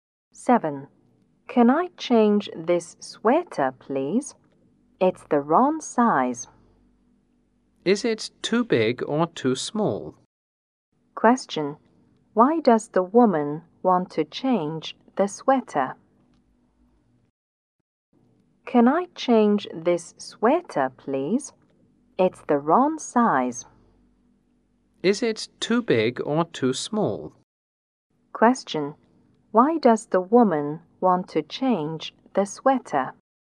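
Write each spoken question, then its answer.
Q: Why does the woman want to change the sweater?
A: It's the wrong size.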